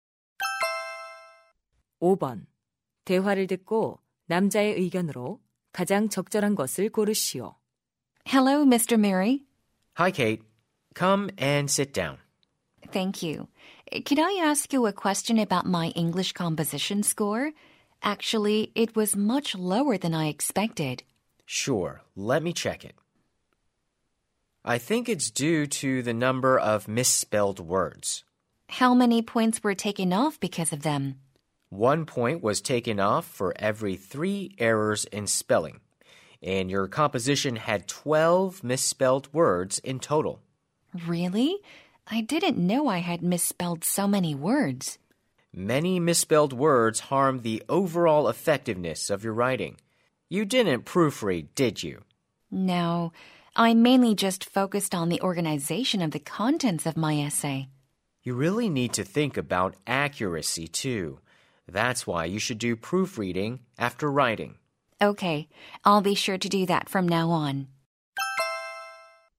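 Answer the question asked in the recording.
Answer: 글을 쓴 후에는 교정을 해야 한다.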